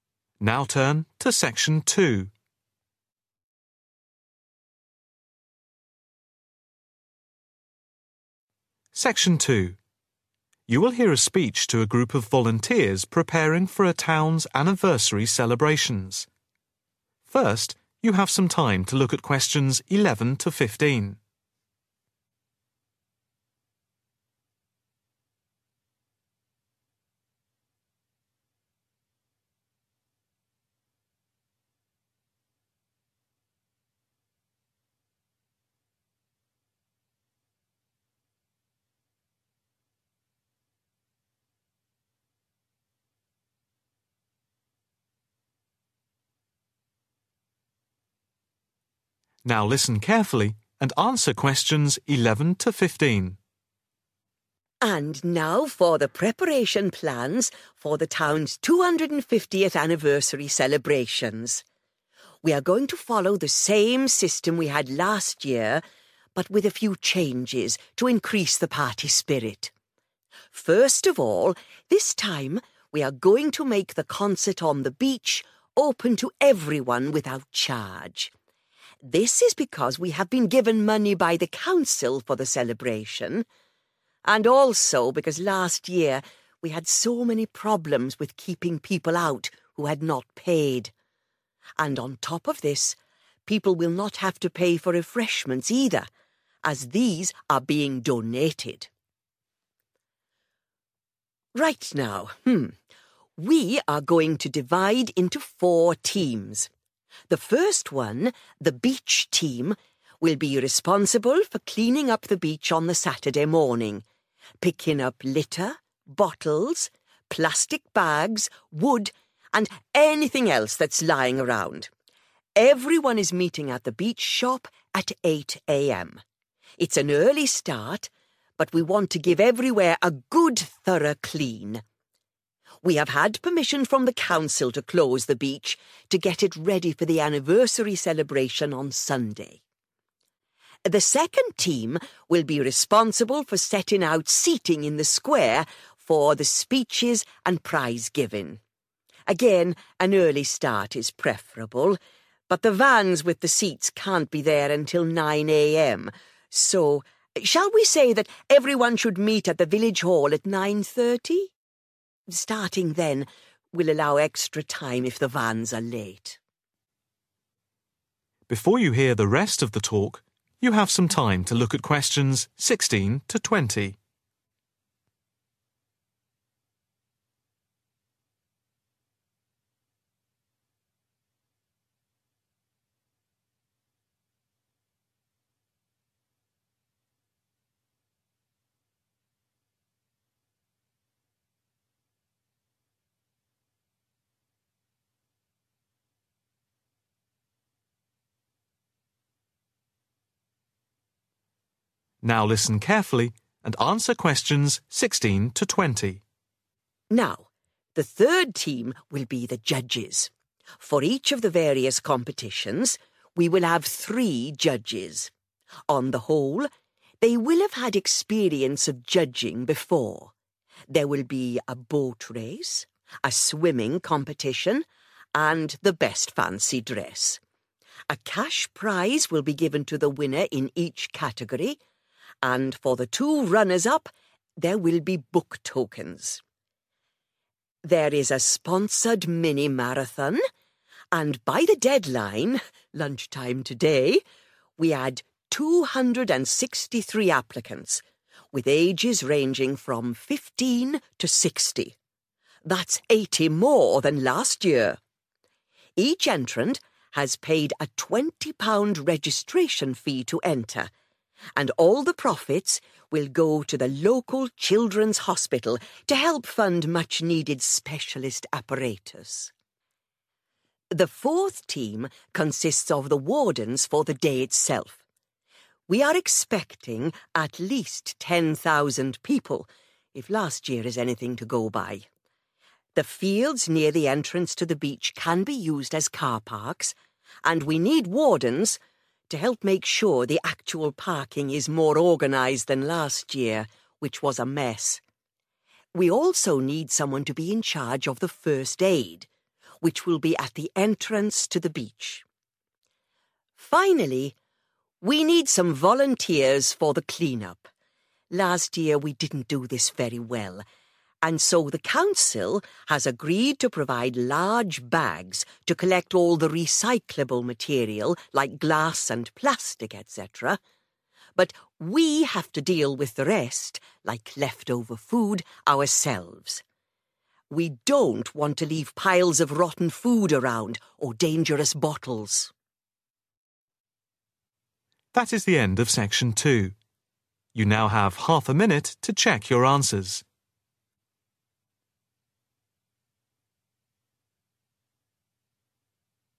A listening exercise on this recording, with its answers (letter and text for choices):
Choose TWO letters A–E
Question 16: What does the speaker say about the judges in the competitions?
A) At least people judging will have some experience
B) None of the judges will have experience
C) Every judge will be experienced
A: A) At least people judging will have some experience

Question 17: The winner in each of the competitions will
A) be given vouchers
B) be awarded a cash prize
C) receive book tokens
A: B) be awarded a cash prize

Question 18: The profits from the marathon will be given to the Children's Hospital to help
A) buy new specialist equipment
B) decorate the hospital wards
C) provide books for the children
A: A) buy new specialist equipment

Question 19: Wardens will be needed at the car park because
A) they helped organise the parking last year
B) the parking last year was disorganised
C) they will be needed to collect parking fees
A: B) the parking last year was disorganised

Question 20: Bags will be provided by the council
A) for all the rubbish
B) only for road rubbish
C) only for material that can be recycled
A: C) only for material that can be recycled